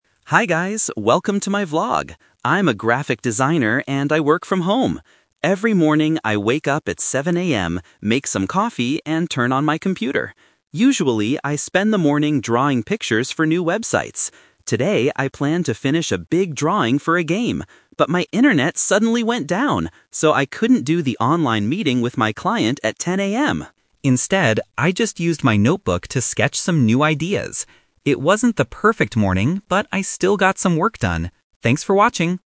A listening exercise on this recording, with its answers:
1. What does Alex usually do in the morning?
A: He draws pictures for websites.

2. Why couldn't Alex meet his client today?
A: The internet stopped working.

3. What did Alex do instead of the online meeting?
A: He sketched ideas in a notebook.

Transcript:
Alex: Hi guys, welcome to my vlog! I'm a graphic designer and I work from home. Every morning, I wake up at 7 AM, make some coffee, and turn on my computer. Usually, I spend the morning drawing pictures for new websites. Today, I planned to finish a big drawing for a game. But my internet suddenly went down! So, I couldn't do the online meeting with my client at 10 AM. Instead, I just used my notebook to sketch some new ideas. It wasn't the perfect morning, but I still got some work done. Thanks for watching!

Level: A2